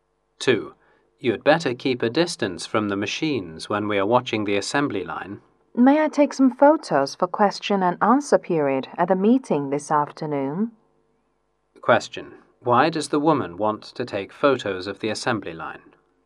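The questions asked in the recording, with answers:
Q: why does the woman want to take photos of the assembly line?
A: For the question and answer period at the meeting this afternoon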